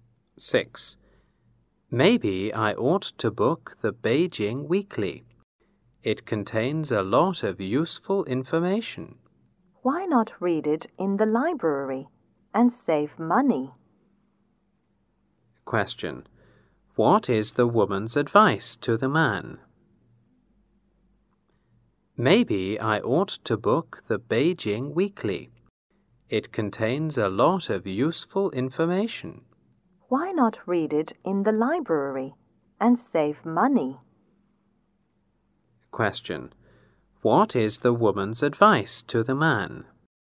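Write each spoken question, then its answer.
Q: What is the woman's advice to the man?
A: Read the Beijing Weekly in the library to save money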